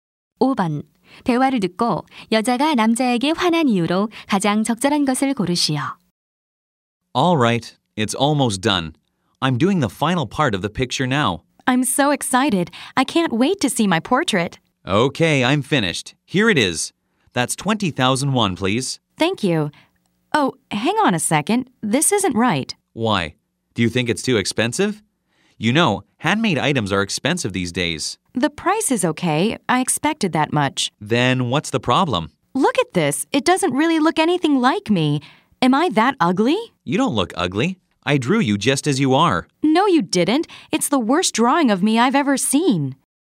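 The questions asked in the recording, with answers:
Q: 대화를 듣고 여자가 남자에게 화난 이유로 가장 적절한 것을 고르시오.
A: 초상화가 자신과 닮지 않아서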